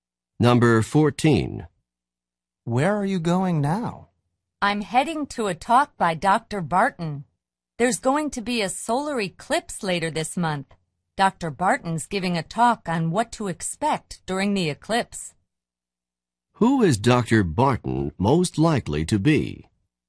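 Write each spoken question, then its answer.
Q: Who is Dr. Barton most likely to be?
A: An astronomer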